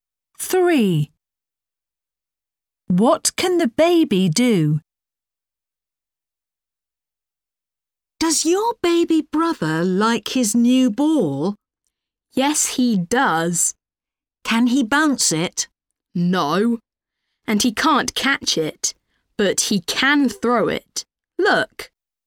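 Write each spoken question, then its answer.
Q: What can the baby do?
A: Throw the ball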